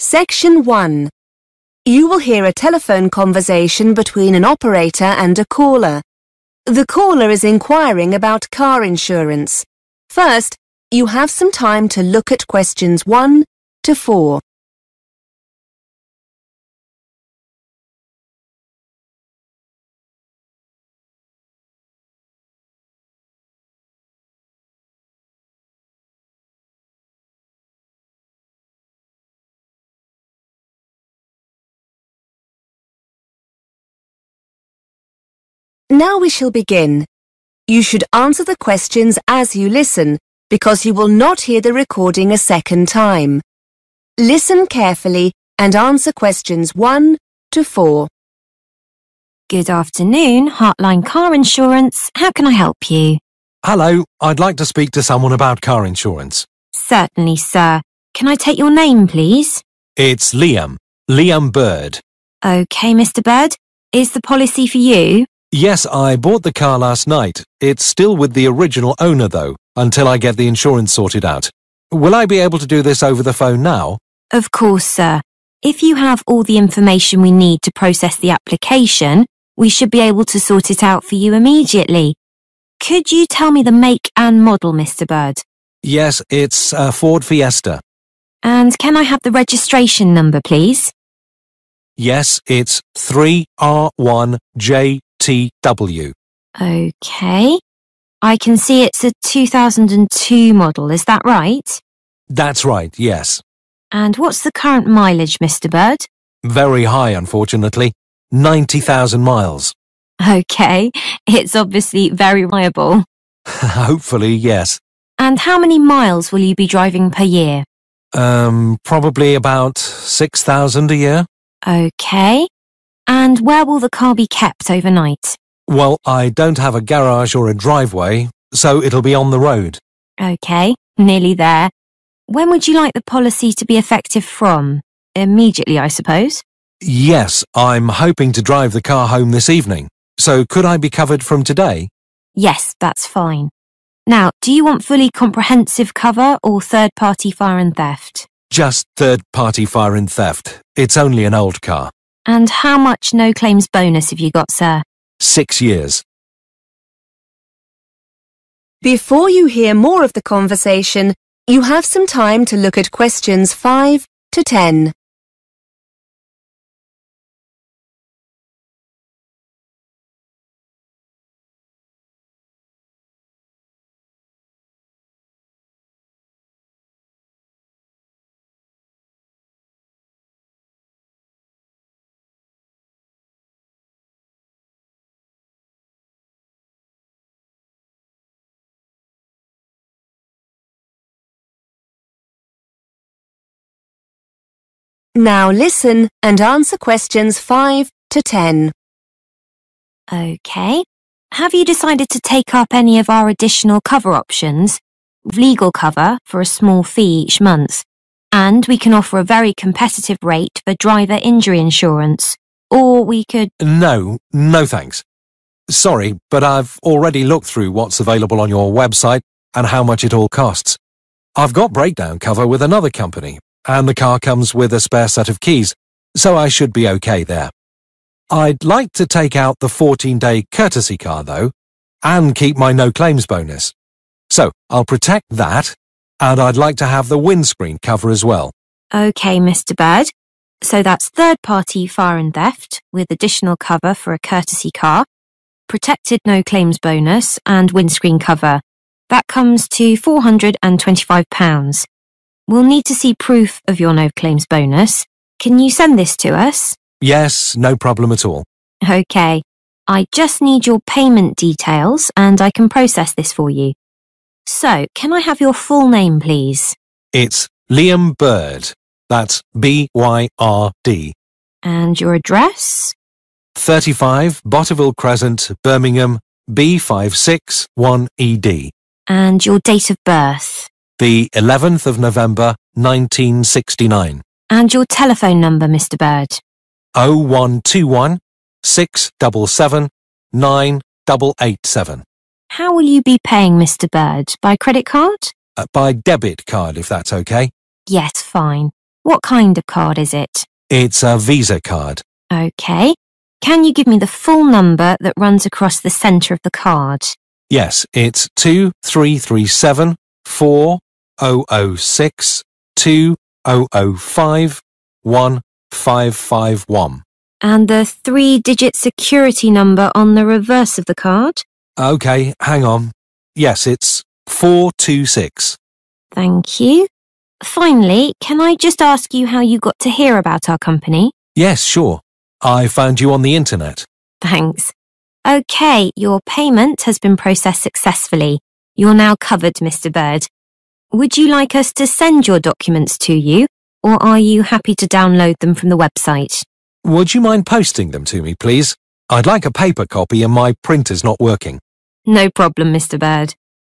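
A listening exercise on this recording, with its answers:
Complete the form below. Write NO MORE THAN THREE WORDS AND/ OR A NUMBER for each answer.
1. Registration: 3R1 (1)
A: JTW

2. Current mileage: (2) miles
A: 90,000

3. Overnight parking: (3)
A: on the road

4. Cover: third party (4)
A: fire and theft

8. Postcode: (8)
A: B56 1ED

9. Payment by: (9)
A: debit card

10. How did the customer hear about Hartline? (10)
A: internet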